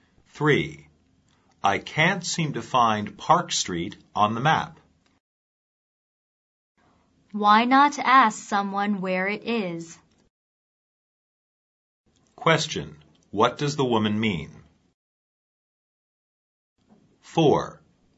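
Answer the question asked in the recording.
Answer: The man should ask someone where Park Street is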